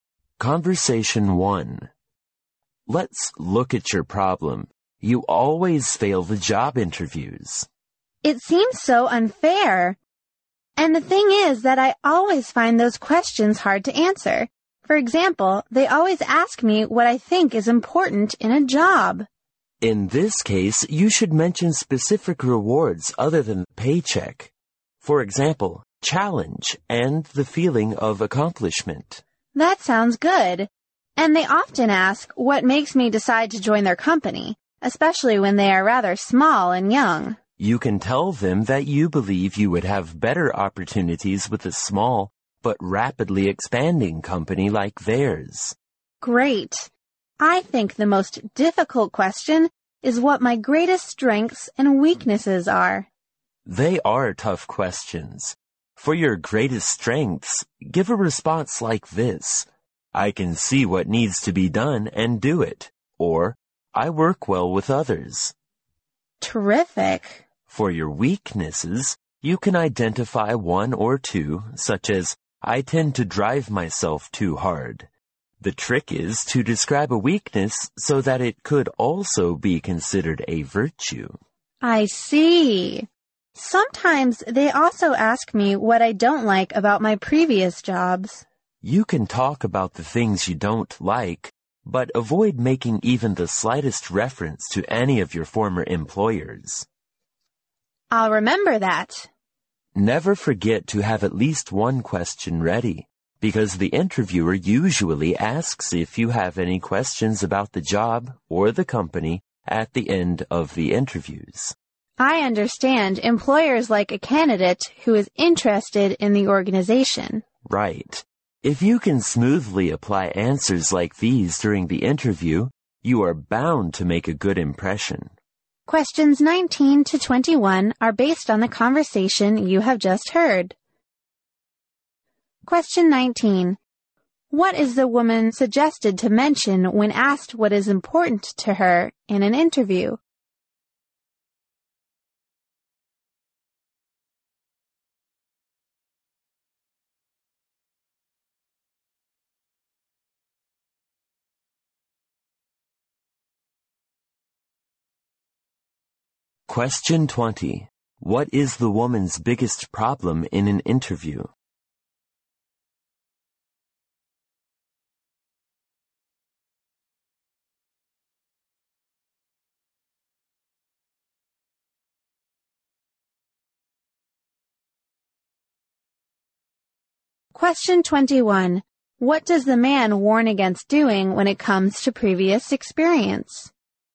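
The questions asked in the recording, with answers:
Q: What is the woman suggested to mention when asked what is important to her in an interview?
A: Specific rewards other than pay, such as challenge and a feeling of accomplishment

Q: What does the man warn against doing when it comes to previous experience?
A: Making any reference to former employers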